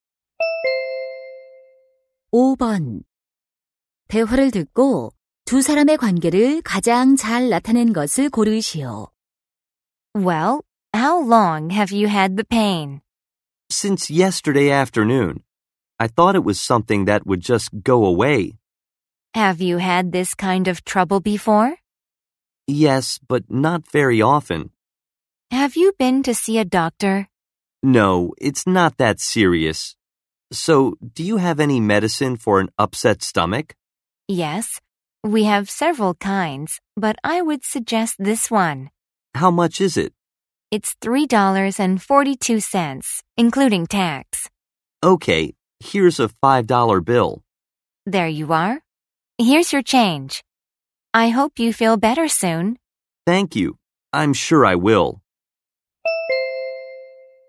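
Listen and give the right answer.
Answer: 약사 - 손님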